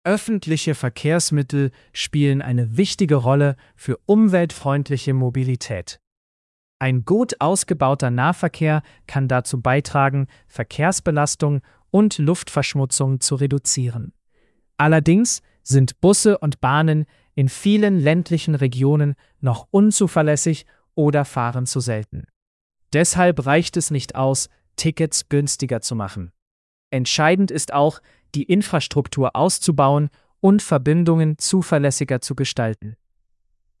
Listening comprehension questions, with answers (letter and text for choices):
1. Welcher Vorteil öffentlicher Verkehrsmittel wird genannt?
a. Sie können Verkehrsbelastung und Luftverschmutzung reduzieren.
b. Sie machen Autos schneller.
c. Sie ersetzen alle Fahrräder.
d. Sie funktionieren überall perfekt.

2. Welches Problem gibt es in ländlichen Regionen?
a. Busse und Bahnen sind teilweise unzuverlässig oder fahren zu selten.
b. Es gibt zu viele Verbindungen.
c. Tickets sind immer kostenlos.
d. Alle Menschen fahren freiwillig Auto.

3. Was ist laut Text entscheidend?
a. Nur günstigere Tickets.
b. Infrastruktur ausbauen und Verbindungen zuverlässiger machen.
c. Öffentliche Verkehrsmittel abschaffen.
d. Nur in Großstädten investieren.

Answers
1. a. Sie können Verkehrsbelastung und Luftverschmutzung reduzieren.
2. a. Busse und Bahnen sind teilweise unzuverlässig oder fahren zu selten.
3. b. Infrastruktur ausbauen und Verbindungen zuverlässiger machen.

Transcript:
Öffentliche Verkehrsmittel spielen eine wichtige Rolle für umweltfreundliche Mobilität. Ein gut ausgebauter Nahverkehr kann dazu beitragen, Verkehrsbelastung und Luftverschmutzung zu reduzieren. Allerdings sind Busse und Bahnen in vielen ländlichen Regionen noch unzuverlässig oder fahren zu selten. Deshalb reicht es nicht aus, Tickets günstiger zu machen. Entscheidend ist auch, die Infrastruktur auszubauen und Verbindungen zuverlässiger zu gestalten.

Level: C1-Niveau